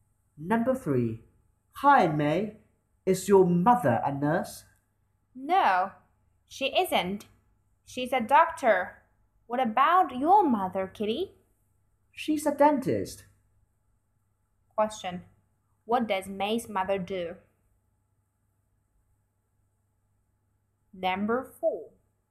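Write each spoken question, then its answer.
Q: What does May's mother do?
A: She's a doctor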